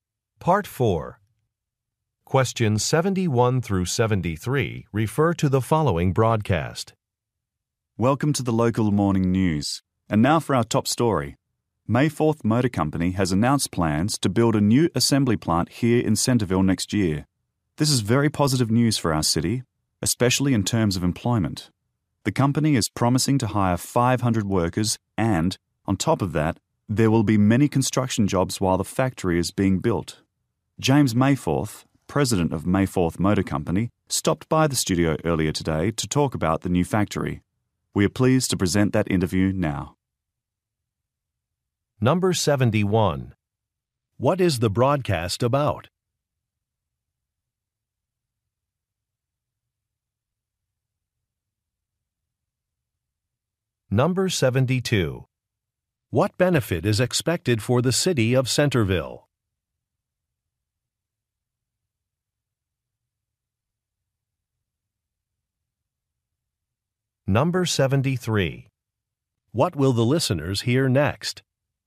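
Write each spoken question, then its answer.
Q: What is the broadcast about?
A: A company's plan to build a new assembly plant in Centerville

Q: What benefit is expected for the city of Centerville?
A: More jobs

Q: What will the listeners hear next?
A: An interview with the company president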